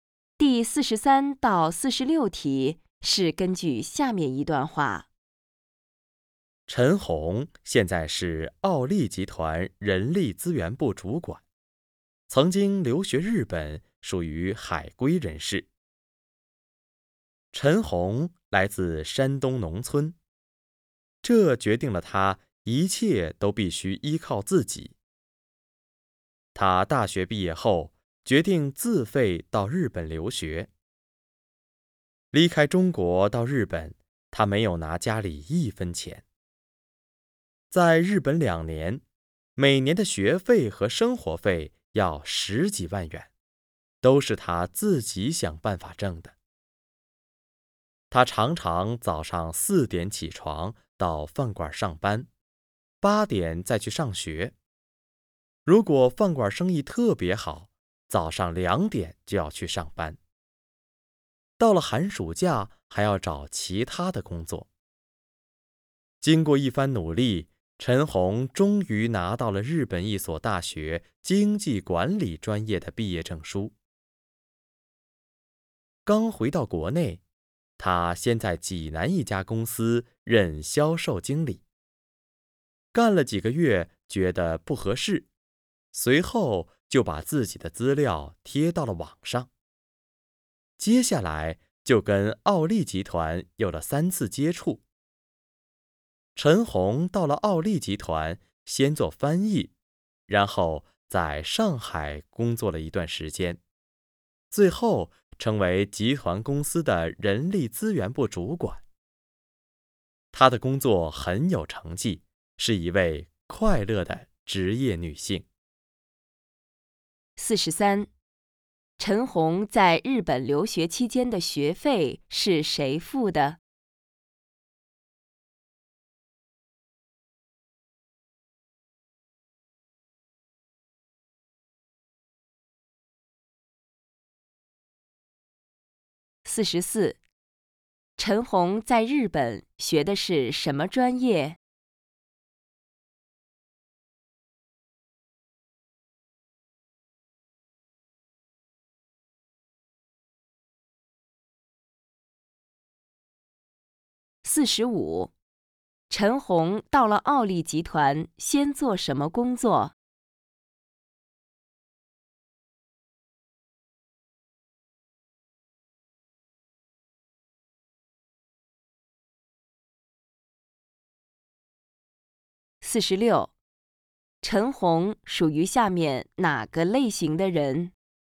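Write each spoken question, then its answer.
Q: 陈红在日本留学期间的学费是谁付的?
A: 她自己

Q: 陈红在日本学的是什么专业?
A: 经济管理

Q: 陈红到了奥利集团先做什么工作?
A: 翻译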